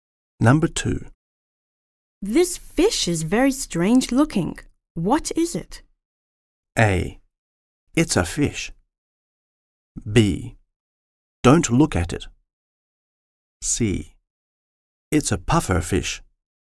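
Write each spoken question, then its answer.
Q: What is it?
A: C: It's a puffer fish.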